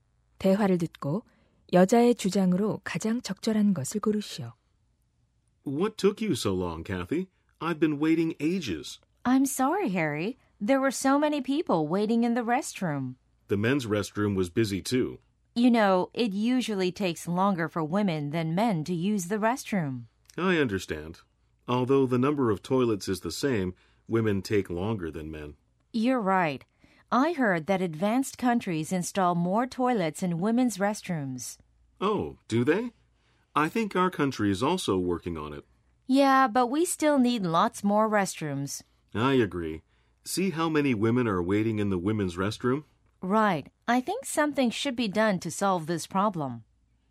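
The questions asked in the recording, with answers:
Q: 대화를 듣고 여자의 주장으로 가장 적절한 것을 고르시오.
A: 여자 화장실의 변기 수를 늘려야 한다.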